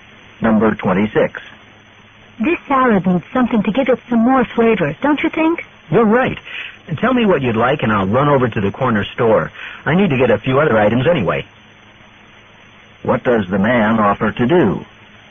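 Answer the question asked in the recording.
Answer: Go to the corner store to buy something for the salad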